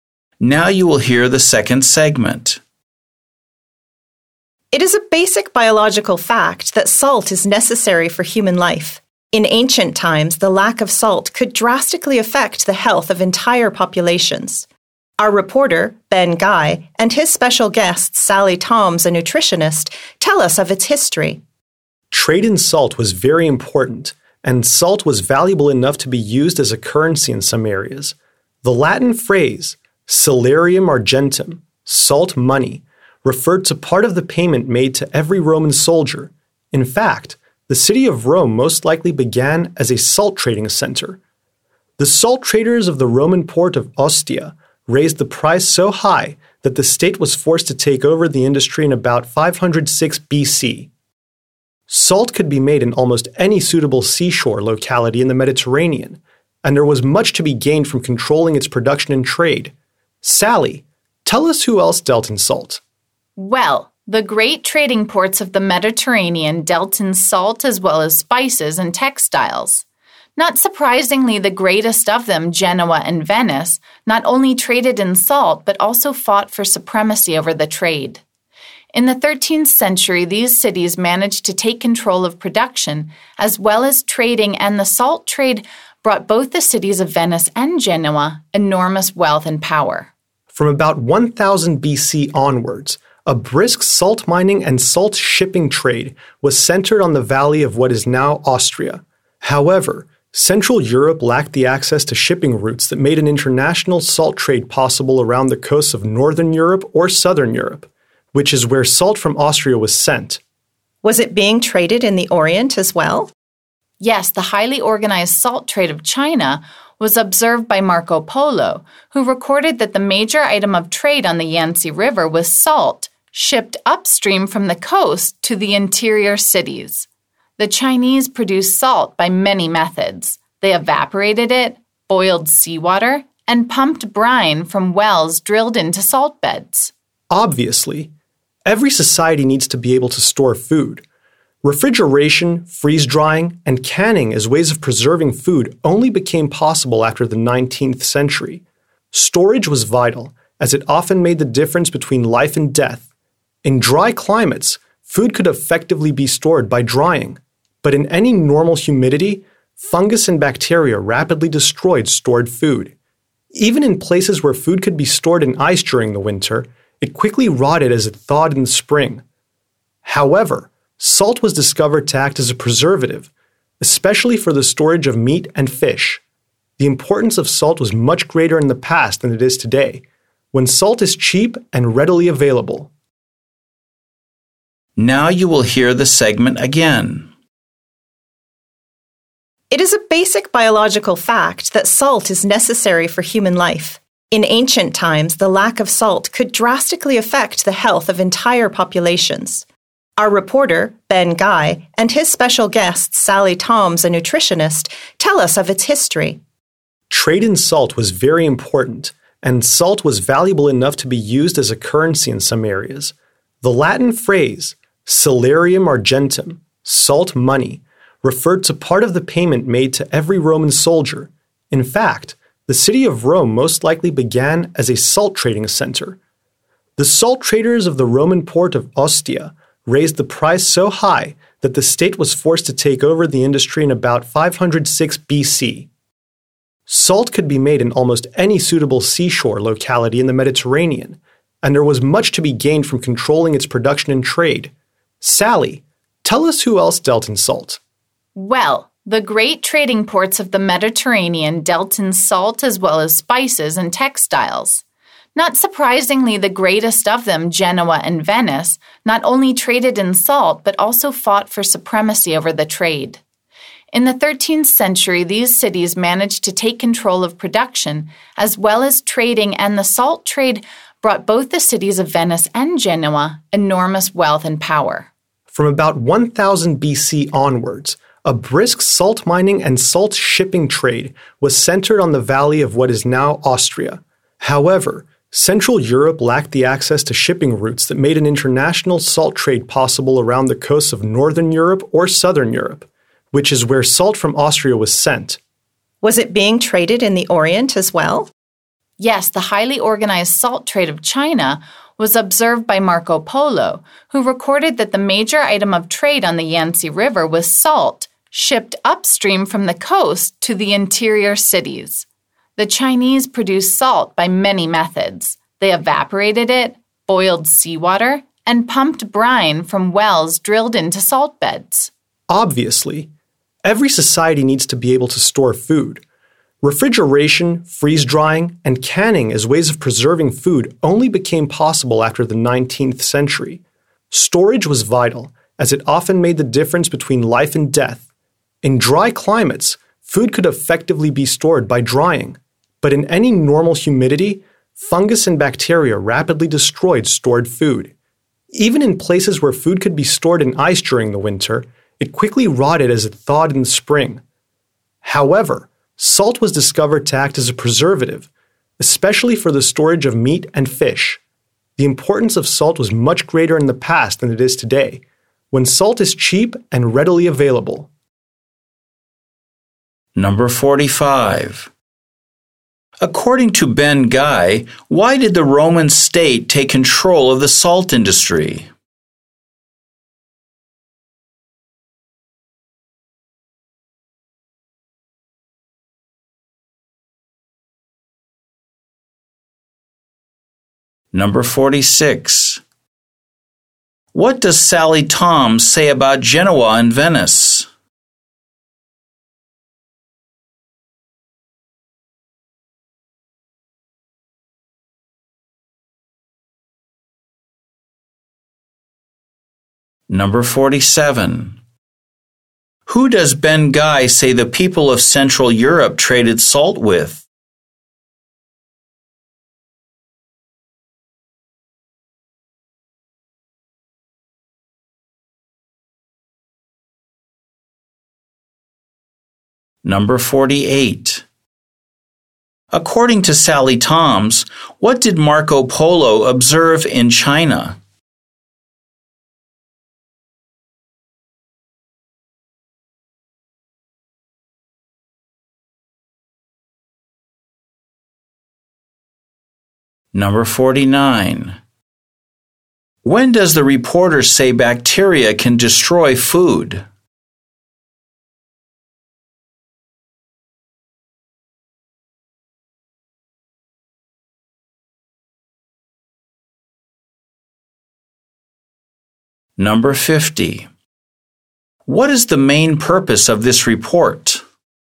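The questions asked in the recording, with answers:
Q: According to Ben Guy, why did the Roman state take control of the salt industry?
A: Because the salt traders of Ostia raised the price too high

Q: What does Sally Tom say about Genoa and Venice?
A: They fought over the salt trade and became rich and powerful from it

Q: Who does Ben Guy say the people of Central Europe traded salt with?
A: Northern and Southern Europe

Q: According to Sally Toms, what did Marco Polo observe in China?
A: An organized salt trade, with salt shipped up the Yangtze River to inland cities

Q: When does the reporter say bacteria can destroy food?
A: In normal humidity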